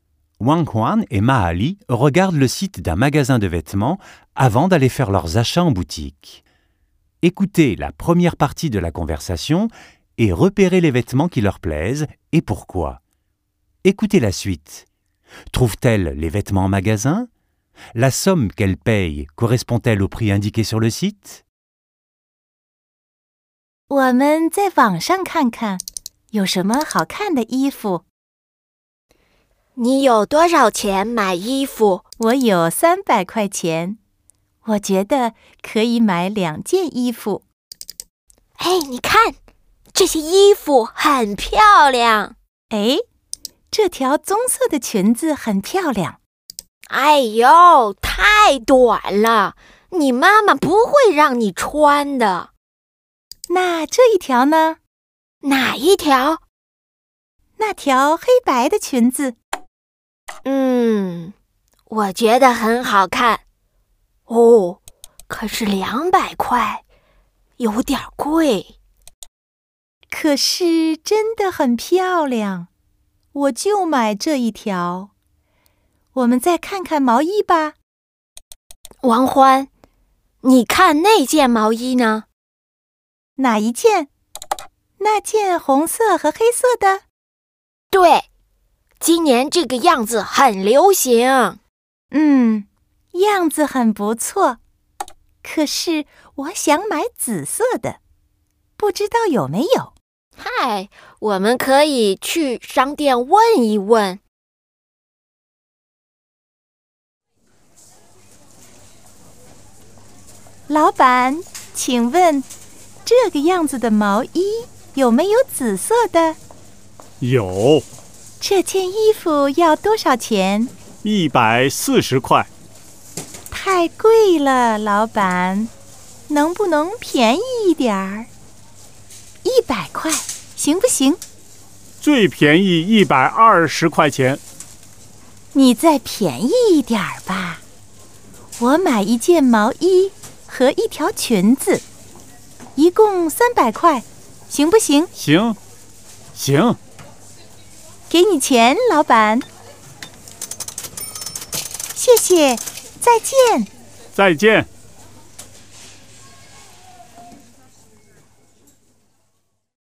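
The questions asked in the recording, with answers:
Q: Trouve-t-elle les vêtements en magasin?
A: Oui, le pull existe en violet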